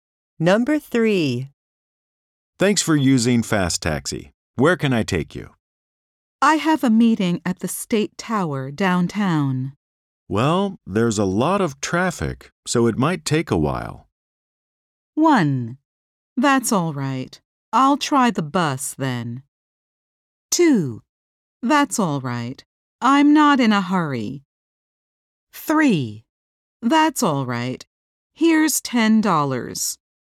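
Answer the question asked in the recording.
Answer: 2: That's all right. I'm not in a hurry.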